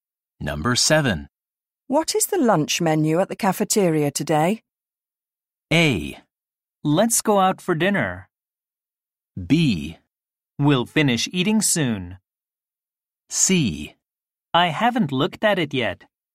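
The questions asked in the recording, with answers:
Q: What is the lunch menu at the cafeteria today?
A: C: I haven't looked at it yet.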